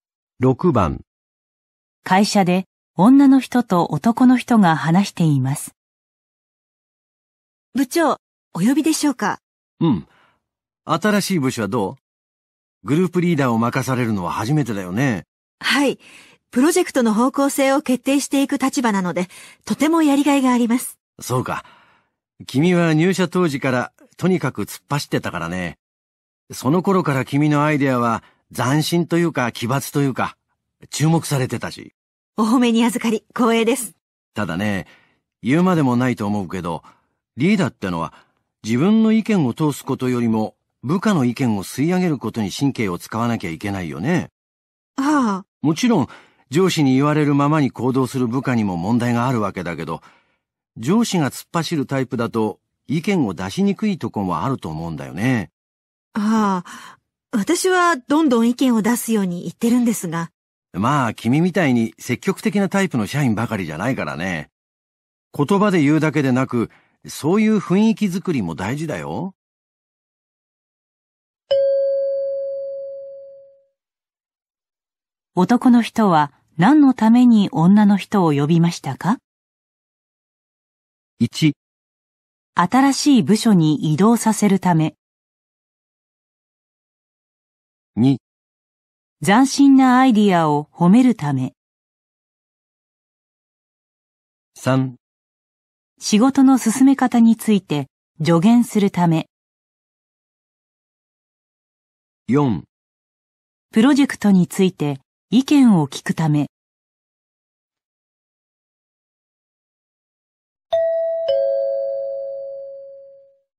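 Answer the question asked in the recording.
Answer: 3: 仕事の進め方について助言するため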